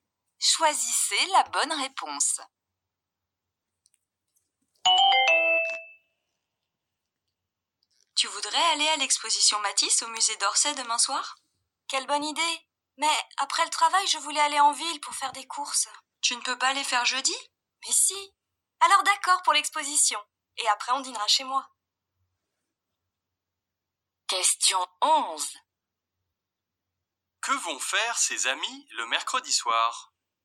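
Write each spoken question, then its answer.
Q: Que vont faire ses amis le mercredi soir?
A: Aller à l'exposition Matisse au musée d'Orsay (puis dîner chez l'un d'eux)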